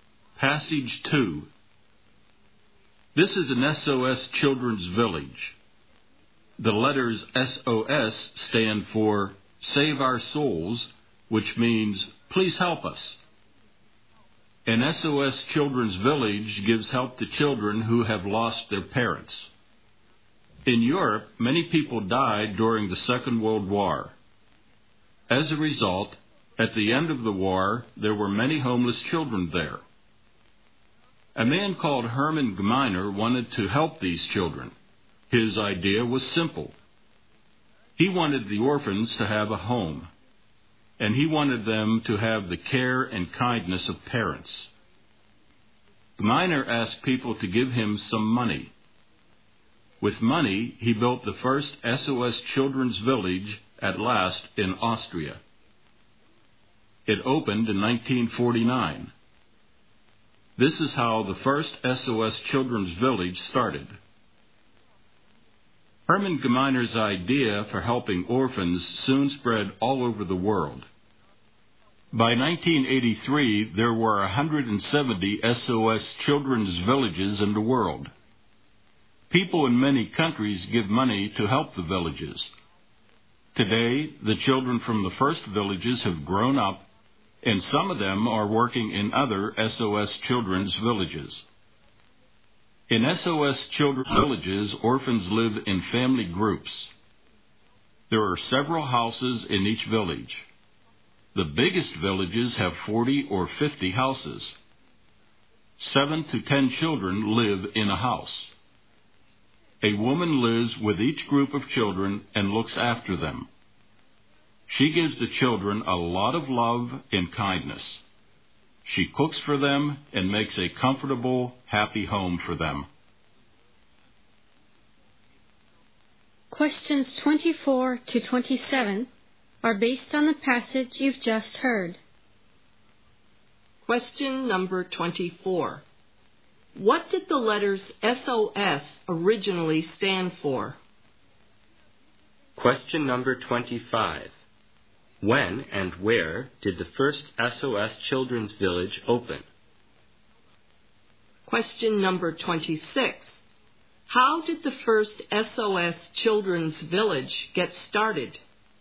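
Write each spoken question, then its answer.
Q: What did the letters SOS originally stand for?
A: Save Our Souls.

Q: When and where did the first SOS Children's Village open?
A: In 1949, in Austria.

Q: How did the first SOS Children's Village get started?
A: Hermann Gmeiner asked people for money and built it.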